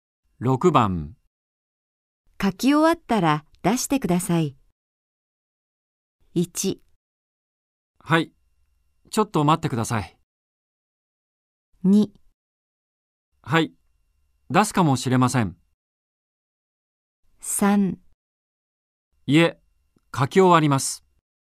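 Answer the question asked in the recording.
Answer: 1: はい、ちょっと待ってください。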